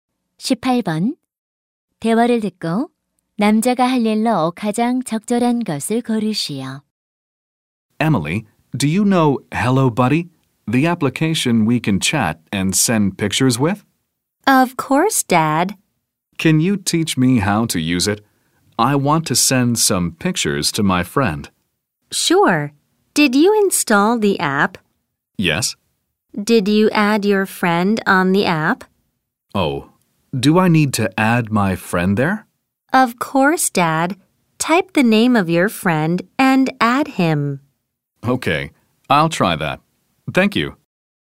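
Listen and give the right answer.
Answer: 앱에 친구 추가하기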